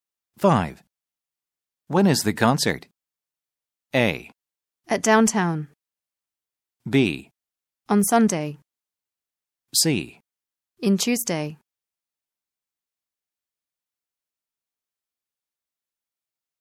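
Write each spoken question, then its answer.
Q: When is the concert?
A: B: On Sunday.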